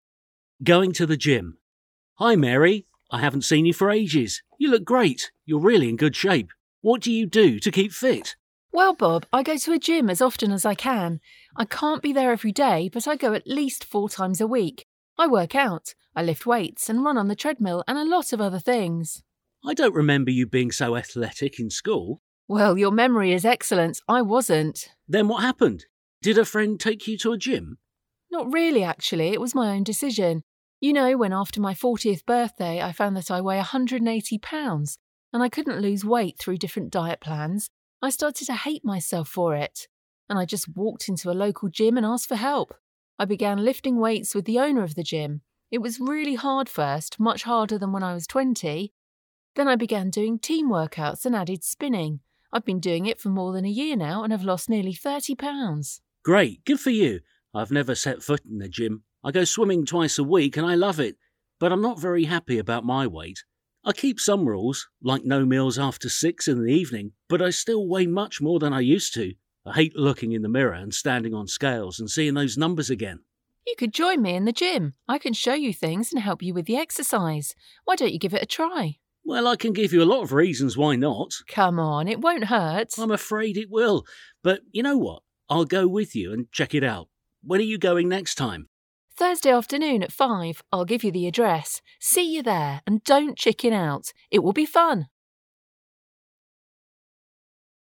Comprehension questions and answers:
Decide if the statements are true or false.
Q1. Mary last met Bob a long time ago.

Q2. She goes to the gym every day.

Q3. She was an excellent athlete in school.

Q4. She went to the gym because the owner was her friend.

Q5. She started going to the gym this year.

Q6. Bob has never been to a gym.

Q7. He doesn't eat anything after six in the evening.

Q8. He doesn't like to look at himself in the mirror.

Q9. He says he needs help with the exercises.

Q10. They are meeting on Tuesday afternoon.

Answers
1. True
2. False
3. False
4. False
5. False
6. True
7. True
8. True
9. False
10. False

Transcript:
Going to the gym
M: Hi Mary, I haven't seen you for ages. You look great. You're really in good shape. What do you do to keep fit?
W: Well Bob, I go to a gym as often as I can. I can't be there every day but I go at least four times a week. I work out. I lift weights and run on the treadmill and a lot of other things.
M: I don't remember you being so athletic in school.
W: Well, your memory is excellent. I wasn't.
M: Then what happened? Did a friend take you to a gym?
W: Not really, actually, it was my own decision. You know, when after my 40th birthday I found that I weigh 180 pounds and I couldn't lose weight through different diet plans I started to hate myself for it. And I just walked into a local gym and asked for help. I began lifting weights with the owner of the gym. It was really hard first, much harder than when I was 20. Then I began doing team workouts and added spinning. I've been doing it for more than a year now and have lost nearly 30 pounds.
M: Great. Good for you. I have never set foot in a gym. I go swimming twice a week and I love it. But I'm not very happy about my weight. I keep some rules, like no meals after six in the evening but I still weigh much more than I used to. I hate looking in the mirror and standing on scales and seeing those numbers again.
W: You could join me in the gym. I can show you things and help you with the exercise. Why don't you give it a try?
M: Well, I can give you a lot of reasons why not...
W: Come on, it won' hurt.
M: I'm afraid, it will. But you know what? I'll go with you and check it out. When are you going next time?
W: Thursday afternoon, at 5. I'll give you the address. See you there. And don't chicken out. It will be fun!

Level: alapfok (B1)